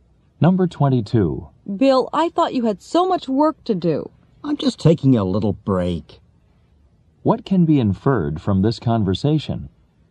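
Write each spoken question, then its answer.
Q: What can be inferred from this conversation?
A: Bill is taking a short break from his work.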